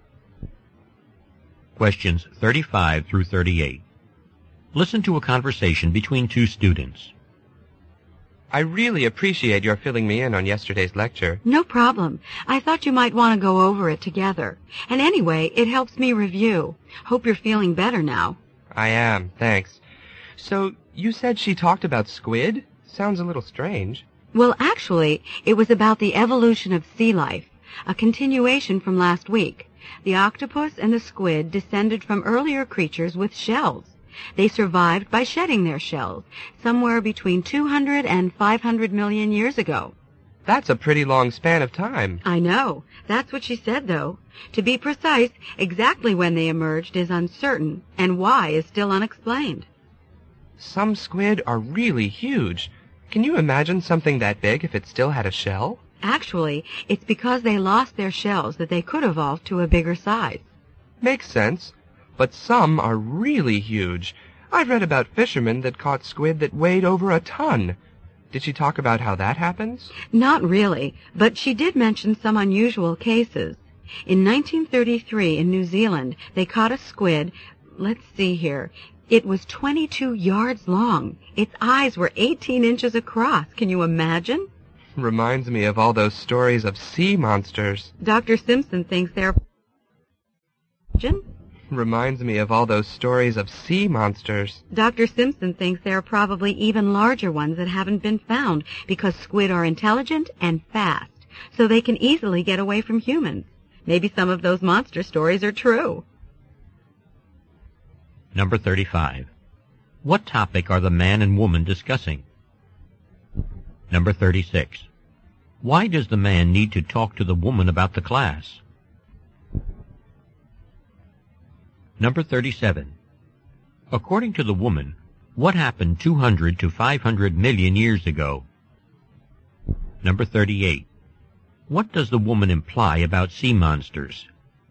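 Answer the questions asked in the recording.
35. The evolution of squid (sea life)
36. He missed the lecture because he was sick
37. Squid and octopus shed their shells
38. Some of the stories may be true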